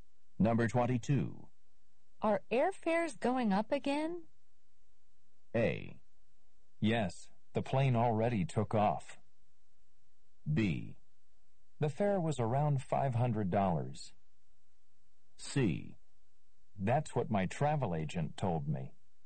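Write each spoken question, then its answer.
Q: Are airfares going up again?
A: C: That's what my travel agent told me.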